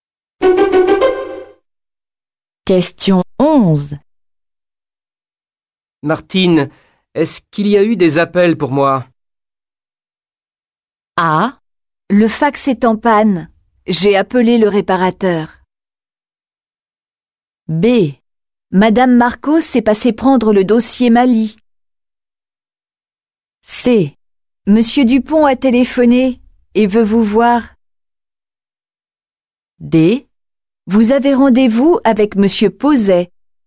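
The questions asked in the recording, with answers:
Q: Martine, est-ce qu'il y a eu des appels pour moi?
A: C: Monsieur Dupont a téléphoné et veut vous voir.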